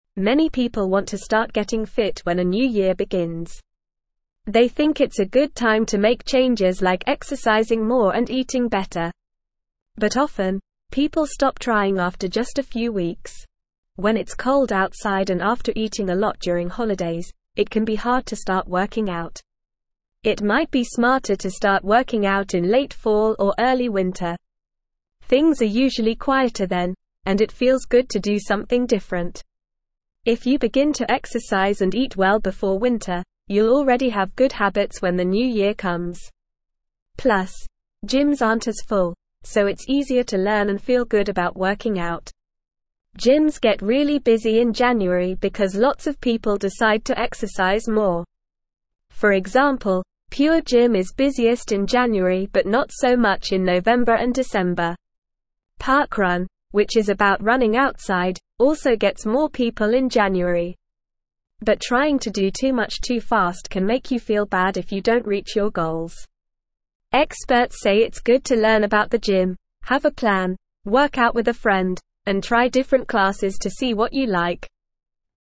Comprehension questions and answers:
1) They (1)______ it's a (2)______ time to make changes like exercising more and eating better.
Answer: think

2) They (1)______ it's a (2)______ time to make changes like exercising more and eating better.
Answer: good

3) But often, people (3)______ trying after just a few weeks.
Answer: stop

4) When it's cold outside and after eating a lot during holidays, it can be hard to (4)______ working out.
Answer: start

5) It might be smarter to start working out in late fall or early (5)______.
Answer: winter

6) Things are usually quieter then, and it (6)______ good to do something different.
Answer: feels

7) Plus, gyms aren't as full, so it's easier to (7)______ and feel good about working out.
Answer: learn

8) Gyms get really busy in January because lots of people decide to exercise (8)______.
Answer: more

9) For example, Pure Gym is busiest in January but not so much in (9)______ and December.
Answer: November

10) Experts say it's good to learn about the gym, have a plan, (10)______ out with a (11)______, and try different classes to see what you (12)______.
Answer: work

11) Experts say it's good to learn about the gym, have a plan, (10)______ out with a (11)______, and try different classes to see what you (12)______.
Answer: friend

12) Experts say it's good to learn about the gym, have a plan, (10)______ out with a (11)______, and try different classes to see what you (12)______.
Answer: like

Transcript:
Many people want to start getting fit when a new year begins. They think it's a good time to make changes like exercising more and eating better. But often, people stop trying after just a few weeks. When it's cold outside and after eating a lot during holidays, it can be hard to start working out.
It might be smarter to start working out in late fall or early winter. Things are usually quieter then, and it feels good to do something different. If you begin to exercise and eat well before winter, you'll already have good habits when the new year comes. Plus, gyms aren't as full, so it's easier to learn and feel good about working out.
Gyms get really busy in January because lots of people decide to exercise more. For example, Pure Gym is busiest in January but not so much in November and December. Parkrun, which is about running outside, also gets more people in January. But trying to do too much too fast can make you feel bad if you don't reach your goals. Experts say it's good to learn about the gym, have a plan, work out with a friend, and try different classes to see what you like.

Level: Level 2